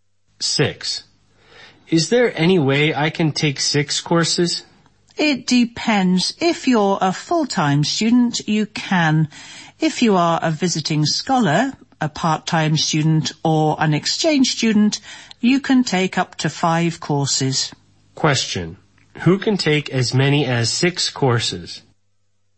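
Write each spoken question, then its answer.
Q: Who can take as many as 6 courses?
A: Full-time students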